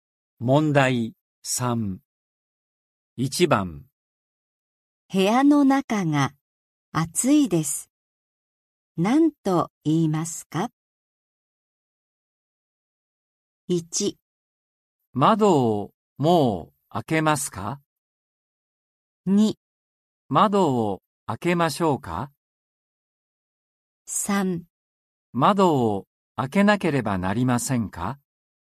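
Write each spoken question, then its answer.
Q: 部屋の中が暑いです。何と言いますか?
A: 2: 窓を開けましょうか?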